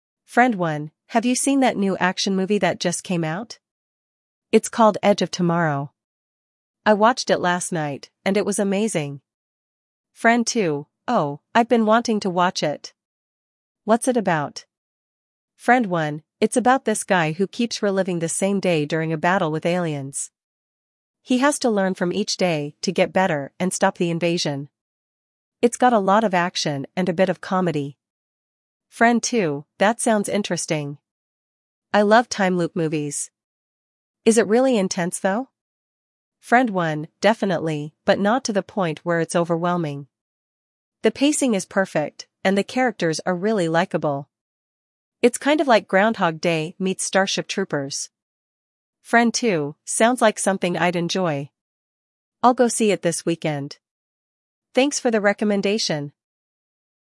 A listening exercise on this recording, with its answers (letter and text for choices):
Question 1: What movie is Friend 1 talking about?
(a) Edge of Tomorrow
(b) The Matrix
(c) Inception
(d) Starship Troopers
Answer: (a) Edge of Tomorrow

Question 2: What is the plot of the movie mentioned?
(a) A battle against aliens that repeats the same day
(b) A battle against time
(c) A group of soldiers fighting for survival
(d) An alien invasion in the future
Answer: (a) A battle against aliens that repeats the same day

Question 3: How does Friend 1 describe the pacing of the movie?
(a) Overwhelming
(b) Perfect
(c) Slow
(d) Too fast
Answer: (b) Perfect

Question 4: Which two movies does Friend 1 compare Edge of Tomorrow to?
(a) Groundhog Day and Starship Troopers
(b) The Matrix and Inception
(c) Alien and Predator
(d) Groundhog Day and The Terminator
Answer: (a) Groundhog Day and Starship Troopers

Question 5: When does Friend 2 plan to watch the movie?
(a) Next week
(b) This weekend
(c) Tonight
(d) Tomorrow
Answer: (b) This weekend

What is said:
Friend 1: "Have you seen that new action movie that just came out? It's called Edge of Tomorrow. I watched it last night, and it was amazing!"
Friend 2: "Oh, I've been wanting to watch it! What's it about?"
Friend 1: "It's about this guy who keeps reliving the same day during a battle with aliens. He has to learn from each day to get better and stop the invasion. It's got a lot of action and a bit of comedy."
Friend 2: "That sounds interesting. I love time-loop movies. Is it really intense though?"
Friend 1: "Definitely, but not to the point where it's overwhelming. The pacing is perfect, and the characters are really likable. It's kind of like Groundhog Day meets Starship Troopers."
Friend 2: "Sounds like something I'd enjoy. I'll go see it this weekend. Thanks for the recommendation!"